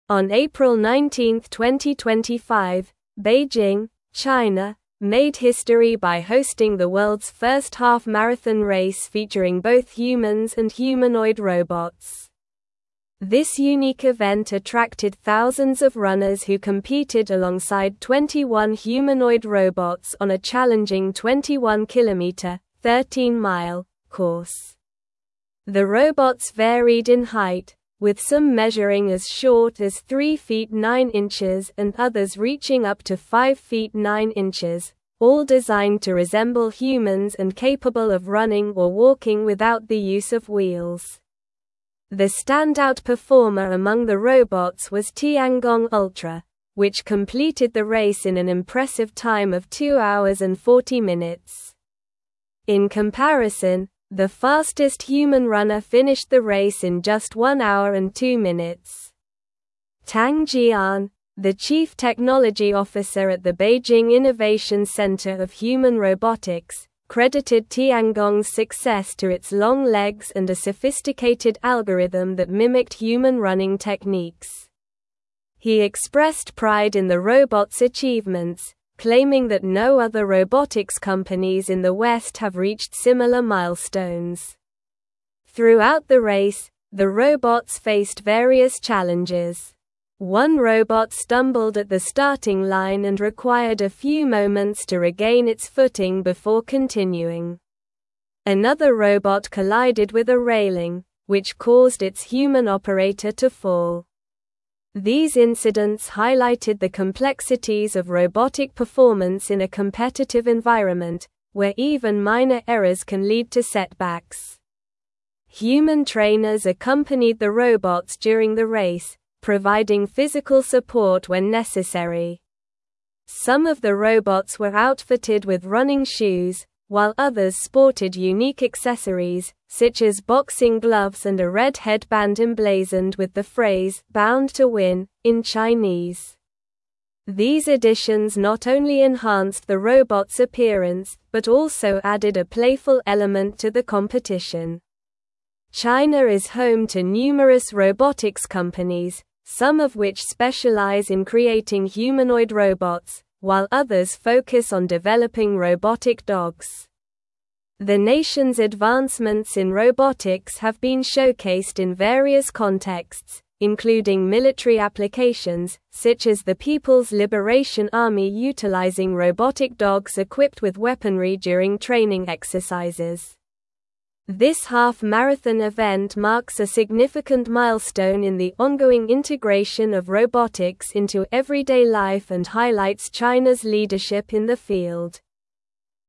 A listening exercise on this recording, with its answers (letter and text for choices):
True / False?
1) The half-marathon event does not signify a significant milestone in the integration of robotics into everyday life and showcases China's lack of leadership in the field.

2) Tiangong Ultra was not the standout performer among the humanoid robots, completing the race in six hours and 40 minutes.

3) Beijing, China, hosted the world's first half-marathon race featuring both humans and humanoid robots on April 19, 2025.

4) Some humanoid robots were outfitted with running shoes, while others had unique accessories like boxing gloves and a red headband.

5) China has numerous robotics companies that specialize in creating humanoid robots and robotic dogs.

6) The fastest human runner did not finish the race in one hour and two minutes.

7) Human trainers accompanied the robots during the race to provide physical support when necessary.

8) The half-marathon course was not 21 kilometers (13 miles) long.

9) On April 19, 2025, Beijing, China, made history by hosting the world's first half-marathon race featuring both humans and (1)______ (2)______.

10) On April 19, 2025, Beijing, China, made history by hosting the world's first half-marathon race featuring both humans and (1)______ (2)______.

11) This (3)______ event attracted thousands of runners who competed alongside 21 humanoid robots on a challenging 21-kilometer (13-mile) course.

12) The standout performer among the robots was Tiangong Ultra, which (4)______ the race in an impressive time of two hours and 40 minutes.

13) In comparison, the fastest human (5)______ finished the race in just one hour and two minutes.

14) Tang Jian, the (6)______ technology officer at the Beijing (7)______ Centre of Human (8)______, credited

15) Tang Jian, the (6)______ technology officer at the Beijing (7)______ Centre of Human (8)______, credited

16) Tang Jian, the (6)______ technology officer at the Beijing (7)______ Centre of Human (8)______, credited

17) These incidents highlighted the complexities of robotic performance in a competitive environment, where even (9)______ errors can lead to setbacks.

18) (10)______ trainers (11)______ the robots during the race, providing physical support when necessary.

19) (10)______ trainers (11)______ the robots during the race, providing physical support when necessary.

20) These (12)______ not only enhanced the robots' appearance but also added a playful element to the competition.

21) (13)______ is home to numerous robotics companies, some of which specialize in creating humanoid robots, while others (14)______ on (15)______ robotic dogs.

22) (13)______ is home to numerous robotics companies, some of which specialize in creating humanoid robots, while others (14)______ on (15)______ robotic dogs.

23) (13)______ is home to numerous robotics companies, some of which specialize in creating humanoid robots, while others (14)______ on (15)______ robotic dogs.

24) This half-marathon (16)______ marks a significant milestone in the ongoing integration of robotics into everyday life and highlights China's leadership in the field.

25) What significant event took place in Beijing on April 19, 2025?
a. The world's first half-marathon race featuring humans and humanoid robots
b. The launch of a new humanoid robot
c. A robotics conference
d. A military training exercise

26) How many humanoid robots participated in the half-marathon race?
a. 15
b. 21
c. 30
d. 10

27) What was the impressive completion time of the standout robot, Tiangong Ultra?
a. One hour and 30 minutes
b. Three hours and 15 minutes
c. Two hours and 10 minutes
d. Two hours and 40 minutes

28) Who is Tang Jian?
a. A leading human runner in the race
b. A robotics engineer from the West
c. The chief technology officer at the Beijing Innovation Centre of Human Robotics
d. The organizer of the half-marathon event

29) What challenges did the robots face during the race?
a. Running out of battery power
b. Getting lost on the course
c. Being unable to follow the human runners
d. Stumbling at the starting line and colliding with railings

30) What unique accessories did some of the robots wear during the race?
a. Running shoes and a red headband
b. Sunglasses and hats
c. Backpacks and water bottles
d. Wristbands and ankle weights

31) What type of applications have China's robotics companies developed?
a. Only humanoid robots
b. Humanoid robots and robotic dogs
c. Only robotic dogs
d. Agricultural robots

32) What does the half-marathon event signify for robotics in China?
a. A decline in robotics development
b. A competition between countries in robotics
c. A significant milestone in the integration of robotics into everyday life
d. An end to traditional running events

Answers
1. False
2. False
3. True
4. True
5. True
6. False
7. True
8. False
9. humanoid
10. robots
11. unique
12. completed
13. runner
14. chief
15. Innovation
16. Robotics
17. minor
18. Human
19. accompanied
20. additions
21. China
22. focus
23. developing
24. event
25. a. The world's first half-marathon race featuring humans and humanoid robots
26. b. 21
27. d. Two hours and 40 minutes
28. c. The chief technology officer at the Beijing Innovation Centre of Human Robotics
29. d. Stumbling at the starting line and colliding with railings
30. a. Running shoes and a red headband
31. b. Humanoid robots and robotic dogs
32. c. A significant milestone in the integration of robotics into everyday life

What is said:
On April 19, 2025, Beijing, China, made history by hosting the world's first half-marathon race featuring both humans and humanoid robots. This unique event attracted thousands of runners who competed alongside 21 humanoid robots on a challenging 21-kilometer (13-mile) course. The robots varied in height, with some measuring as short as 3 feet 9 inches and others reaching up to 5 feet 9 inches, all designed to resemble humans and capable of running or walking without the use of wheels.
The standout performer among the robots was Tiangong Ultra, which completed the race in an impressive time of two hours and 40 minutes. In comparison, the fastest human runner finished the race in just one hour and two minutes. Tang Jian, the chief technology officer at the Beijing Innovation Centre of Human Robotics, credited Tiangong's success to its long legs and a sophisticated algorithm that mimicked human running techniques. He expressed pride in the robot's achievements, claiming that no other robotics companies in the West have reached similar milestones.
Throughout the race, the robots faced various challenges. One robot stumbled at the starting line and required a few moments to regain its footing before continuing. Another robot collided with a railing, which caused its human operator to fall. These incidents highlighted the complexities of robotic performance in a competitive environment, where even minor errors can lead to setbacks.
Human trainers accompanied the robots during the race, providing physical support when necessary. Some of the robots were outfitted with running shoes, while others sported unique accessories, such as boxing gloves and a red headband emblazoned with the phrase "Bound to Win" in Chinese. These additions not only enhanced the robots' appearance but also added a playful element to the competition.
China is home to numerous robotics companies, some of which specialize in creating humanoid robots, while others focus on developing robotic dogs. The nation's advancements in robotics have been showcased in various contexts, including military applications, such as the People's Liberation Army utilizing robotic dogs equipped with weaponry during training exercises. This half-marathon event marks a significant milestone in the ongoing integration of robotics into everyday life and highlights China's leadership in the field.

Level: Level 4